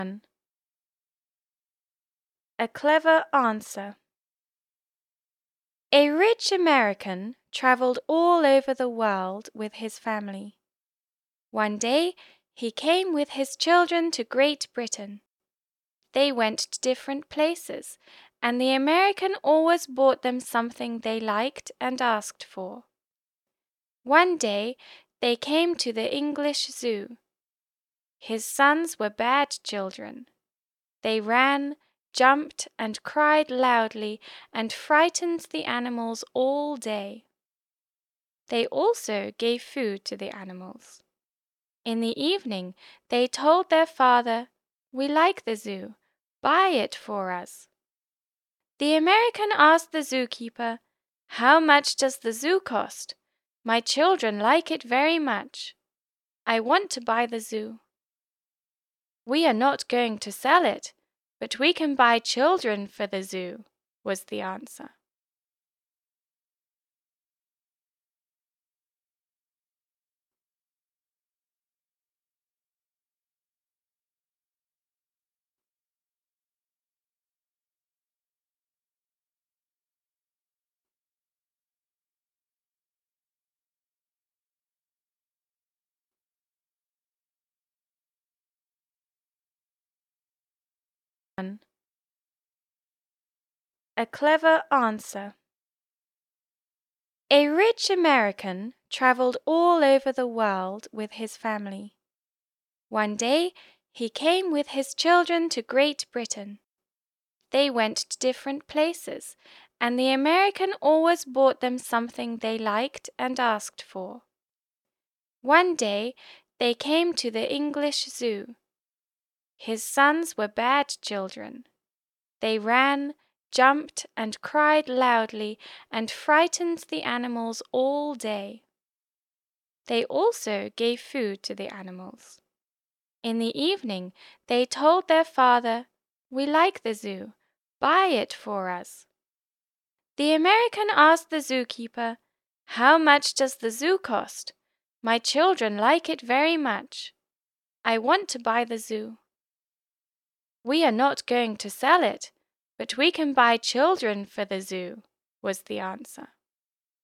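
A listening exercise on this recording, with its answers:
Послушайте аудио и выберите правильный ответ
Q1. Who did the American travel with?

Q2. What did he always do for his children?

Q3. Why did the children frighten the animals?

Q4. Why did the American ask about the price of the Zoo?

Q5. What did the Zookeeper answer?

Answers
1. With his family
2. He always bought them something they liked and asked for
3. They were bad children
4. His children liked it and he wanted to buy it
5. They would not sell the zoo, but they could buy children for the zoo

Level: 8 «Е, Д» классы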